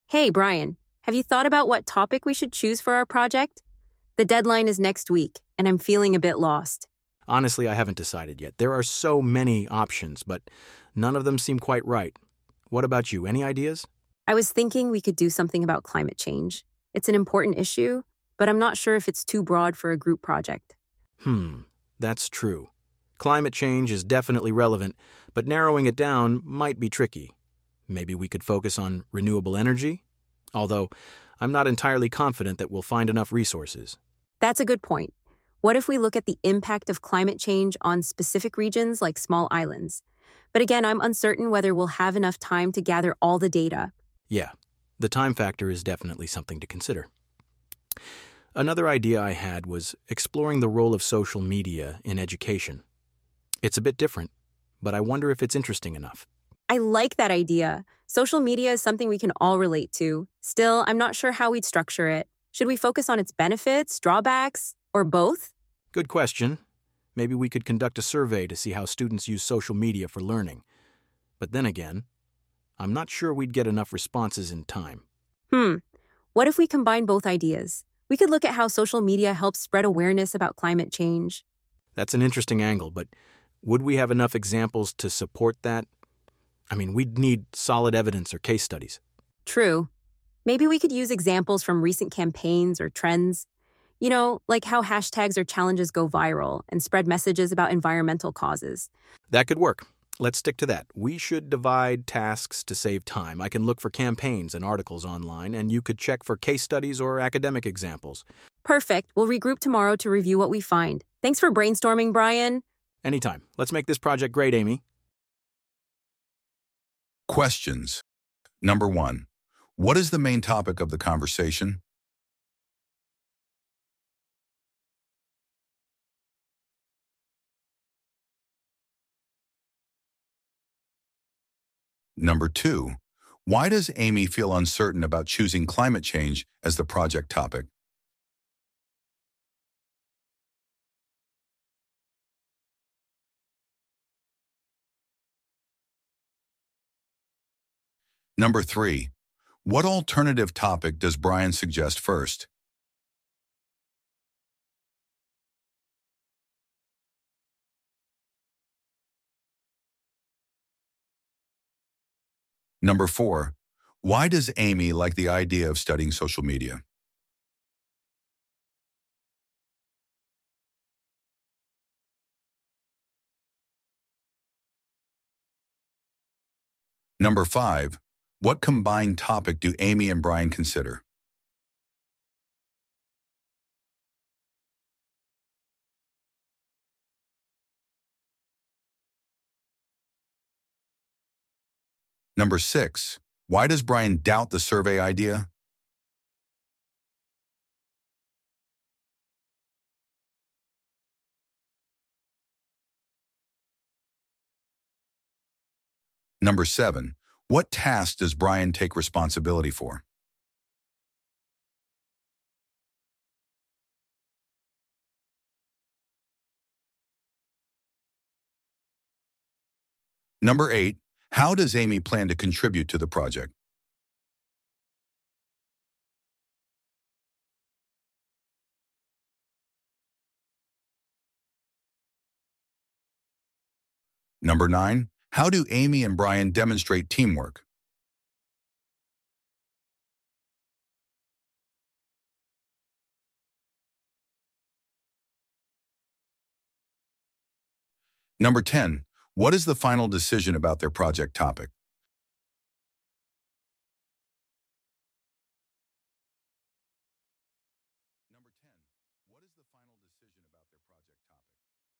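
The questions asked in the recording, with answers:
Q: what is the main topic of the conversation?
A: Choosing a topic for their group project

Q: why does Amy feel uncertain about choosing climate change as the project topic?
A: She thinks it may be too broad for a group project

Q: why does Amy like the idea of studying social media?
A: Because social media is something they can all relate to

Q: what combined topic do Amy and Brian consider?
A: How social media helps spread awareness about climate change

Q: why does Brian doubt the survey idea?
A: He's not sure they'd get enough responses in time

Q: what task does Brian take responsibility for?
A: Looking for campaigns and articles online

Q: how does Amy plan to contribute to the project?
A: By checking for case studies or academic examples

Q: how do Amy and Brian demonstrate teamwork?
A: They brainstorm together, divide the tasks and plan to meet again tomorrow to review what they find

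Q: what is the final decision about their project topic?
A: How social media helps spread awareness about climate change, using examples from campaigns and viral trends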